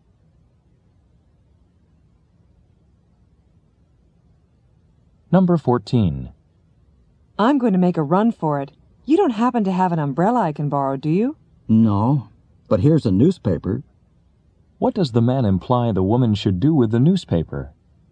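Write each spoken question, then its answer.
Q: What does the man imply the woman should do with the newspaper?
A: Use it to cover her head from the rain.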